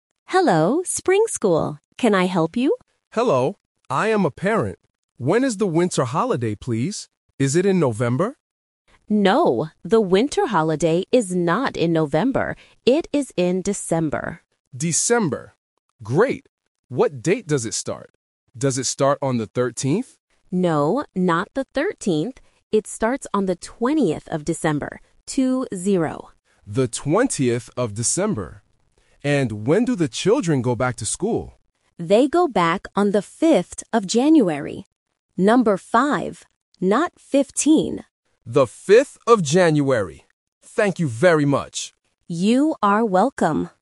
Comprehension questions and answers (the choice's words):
Listen to the phone call between a parent and a school secretary. Choose the correct answer (A, B, or C) for each question.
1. What month is the winter holiday?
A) November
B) December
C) January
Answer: December

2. What date does the holiday start?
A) The 13th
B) The 20th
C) The 30th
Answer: The 20th

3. When do the children go back to school?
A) January 5th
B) January 15th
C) January 20th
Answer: January 5th

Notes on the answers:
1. The parent asks, "Is it in November?" (Option A is the trap). The secretary answers, "No, the winter holiday is not in November. It is in December". Option C (January) is the month the children return, not the month the holiday starts.
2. The parent asks if it starts on "the 13th" (Option A is the trap). The secretary says, "No, not the 13th. It starts on the 20th of December," and repeats "Two-zero" to confirm. Option C (The 30th) is a phonetic trap because 13 and 30, as well as 20 and 30, can be confusing for beginners.
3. The secretary clearly states, "They go back on the 5th of January," and reinforces it by saying "Number five. Not 15." Option B (January 15th) is the main phonetic trap explicitly denied by the secretary. Option C (January 20th) is a trap using the start date's number.

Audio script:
Secretary: Hello, Spring School. Can I help you?
Parent: Hello. I am a parent. When is the winter holiday, please? Is it in November?
Secretary: No, the winter holiday is not in November. It is in December.
Parent: December. Great. What date does it start? Does it start on the 13th?
Secretary: No, not the 13th. It starts on the 20th of December. Two-zero.
Parent: The 20th of December. And when do the children go back to school?
Secretary: They go back on the 5th of January. Number five. Not 15.
Parent: The 5th of January. Thank you very much!